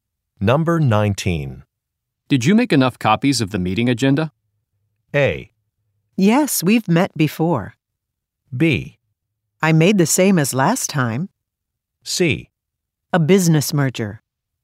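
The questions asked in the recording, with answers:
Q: Did you make enough copies of the meeting agenda?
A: B: I made the same as last time.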